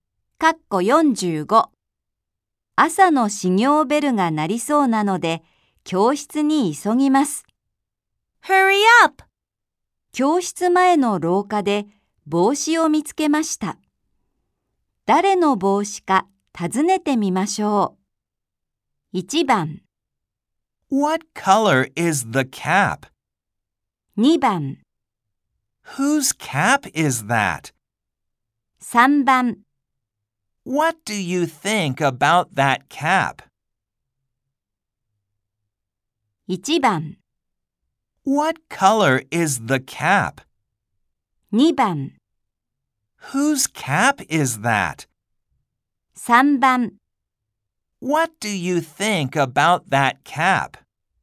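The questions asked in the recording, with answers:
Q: 教室前の廊下で帽子を見つけました。誰の帽子か尋ねてみましょう。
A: 2: Whose cap is that?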